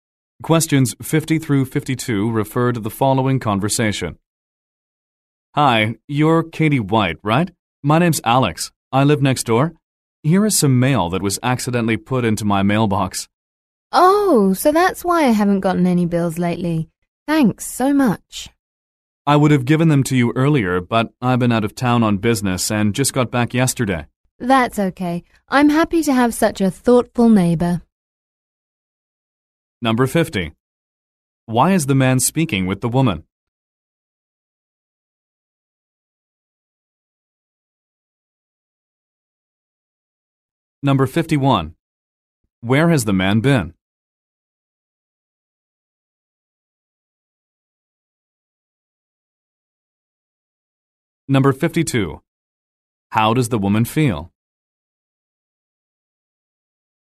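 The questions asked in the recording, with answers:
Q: Why is the man speaking with the woman?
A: To give her mail that was put in his mailbox by mistake

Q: Where has the man been?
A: Out of town on business

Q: How does the woman feel?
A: Grateful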